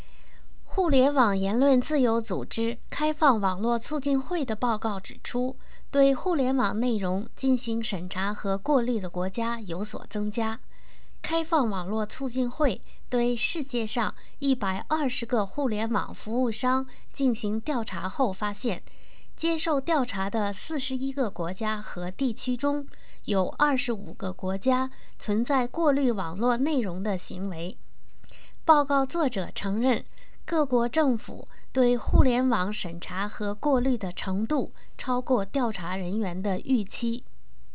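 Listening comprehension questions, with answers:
Please answer the following questions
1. Among the forty-one countries which participated in the survey, how many censor their internet contents?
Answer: 25

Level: M.Phil Year 2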